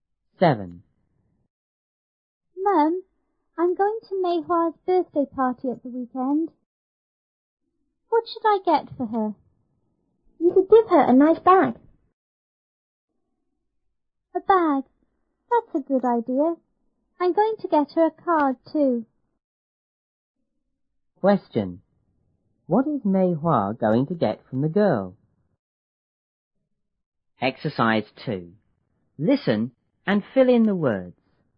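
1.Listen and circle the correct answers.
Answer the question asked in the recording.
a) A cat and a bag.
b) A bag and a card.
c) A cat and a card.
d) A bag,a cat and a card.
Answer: b) A bag and a card.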